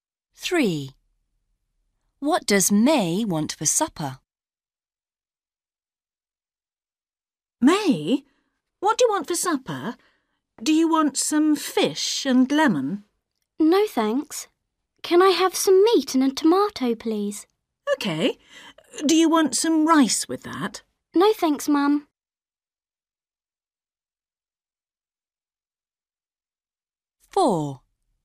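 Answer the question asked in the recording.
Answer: Meat and a tomato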